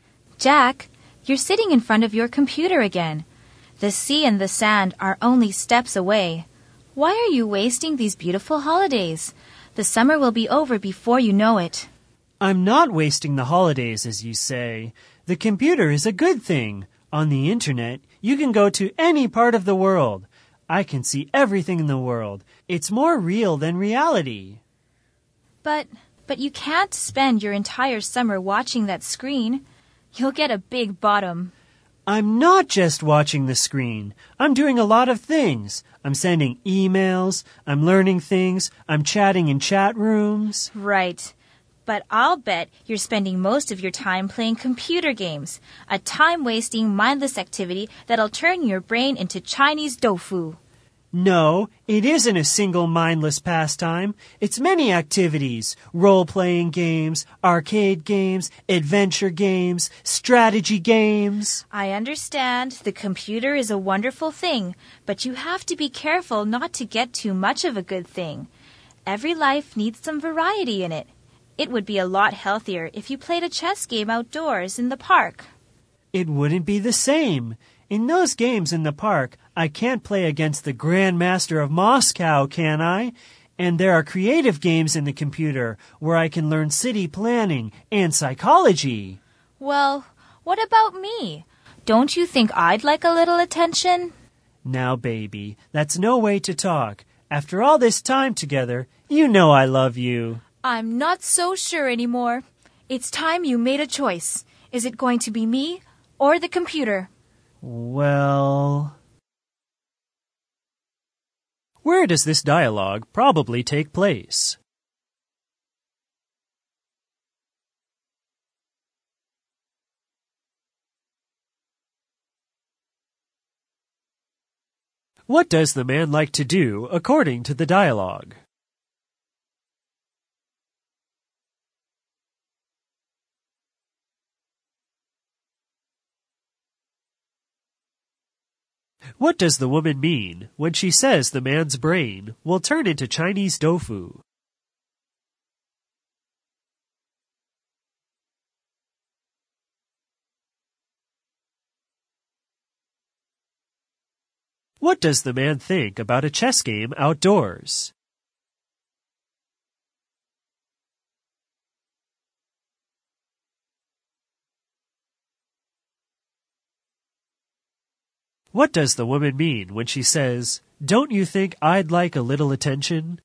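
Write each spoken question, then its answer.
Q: What does the man like to do according to the dialogue?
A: Use the computer, especially playing computer games

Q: What does the woman mean when she says the man's brain will turn into Chinese tofu?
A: Playing computer games will make him stupid

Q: What does the man think about a chess game outdoors?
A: It's not the same; he can't play against the Grand Master of Moscow

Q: What does the woman mean when she says, "Don't you think I'd like a little attention?"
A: She feels neglected and wants him to spend time with her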